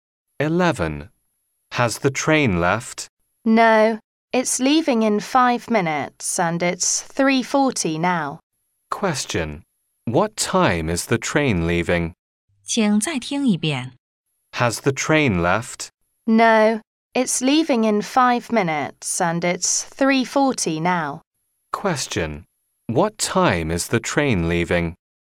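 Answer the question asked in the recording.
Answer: 3:45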